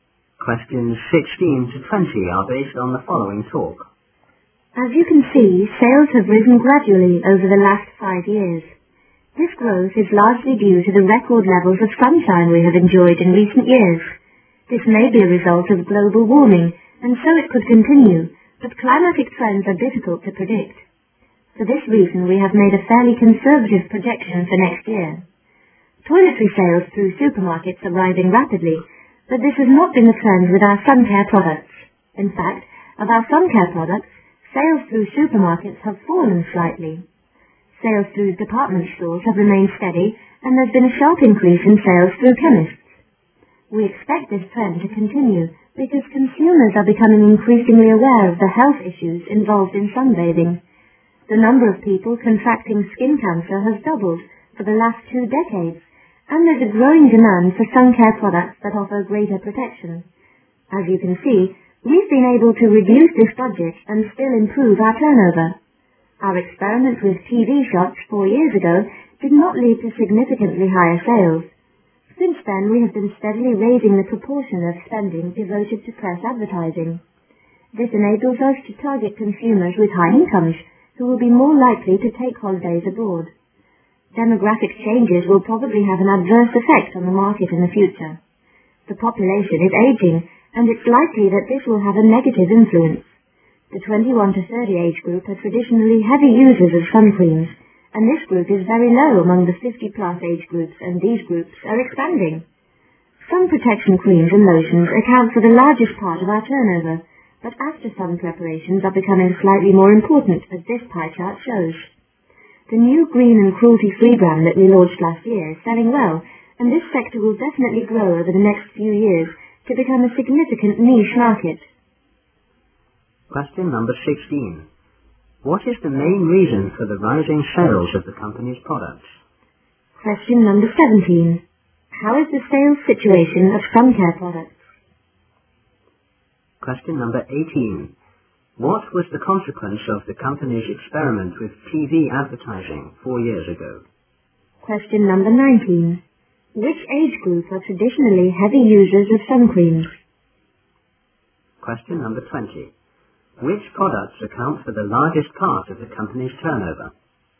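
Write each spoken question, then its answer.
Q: What is the main reason for the rising sales of the company's products?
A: Record levels of sunshine in recent years

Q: What was the consequence of the company's experiment with TV advertising 4 years ago?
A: It did not lead to significantly higher sales

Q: Which age group are traditionally heavy users of sun creams?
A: The 21 to 30 age group

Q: Which products account for the largest part of the company's turnover?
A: Sun protection creams and lotions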